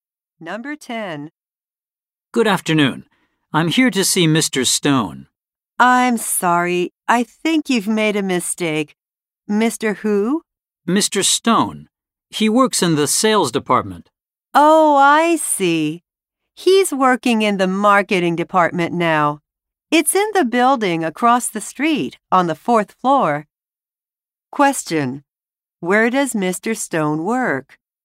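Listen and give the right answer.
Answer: In the marketing department, in the building across the street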